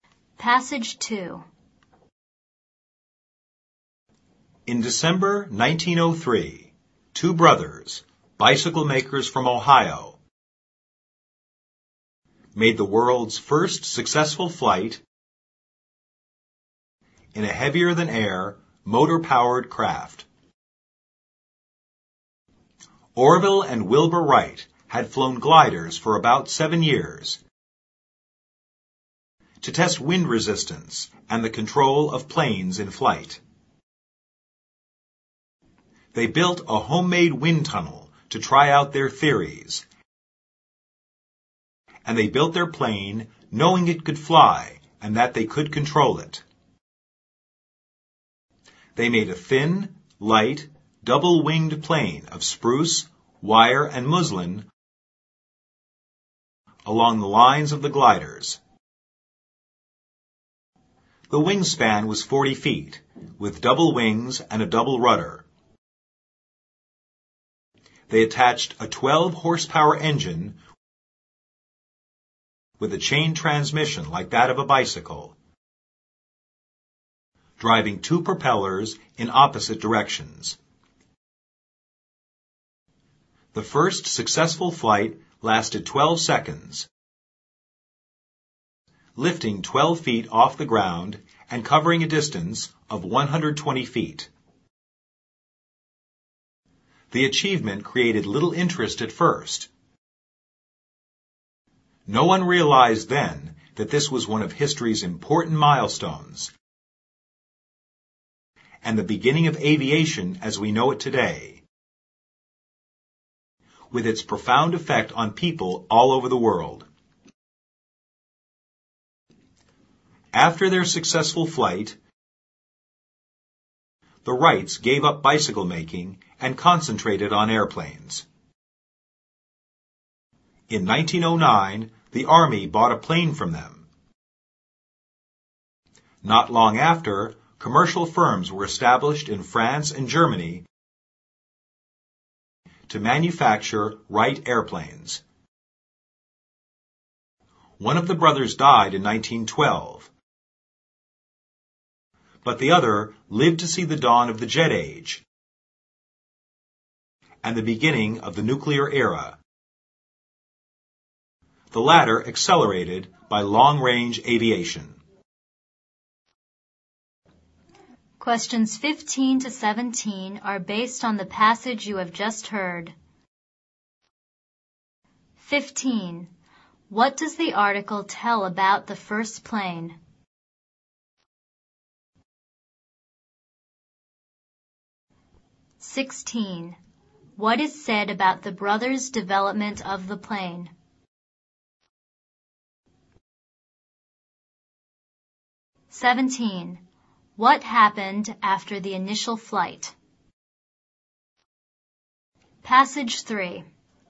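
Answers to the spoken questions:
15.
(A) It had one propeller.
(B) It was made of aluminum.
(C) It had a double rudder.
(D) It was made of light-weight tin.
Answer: (C) It had a double rudder.
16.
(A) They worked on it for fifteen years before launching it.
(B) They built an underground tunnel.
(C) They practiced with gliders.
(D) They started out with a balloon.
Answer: (C) They practiced with gliders.
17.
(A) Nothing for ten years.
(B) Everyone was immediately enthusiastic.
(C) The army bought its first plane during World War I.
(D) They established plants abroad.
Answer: (D) They established plants abroad.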